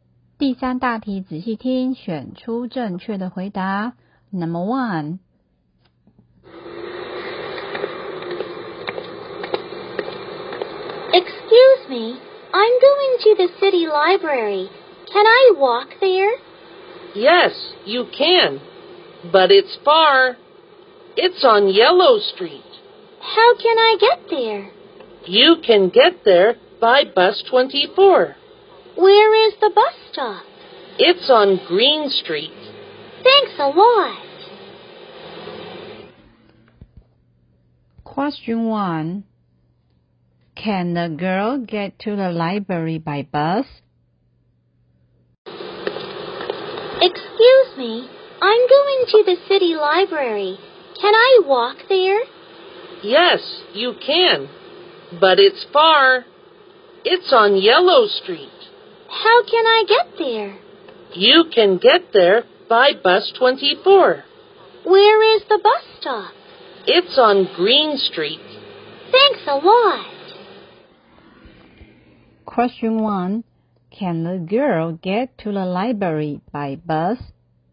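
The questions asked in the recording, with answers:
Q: Can the girl get to the library by bus?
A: Yes, by bus 24.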